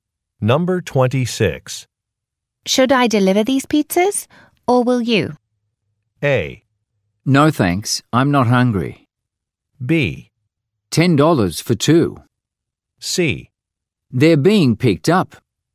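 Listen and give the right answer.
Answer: C: They're being picked up.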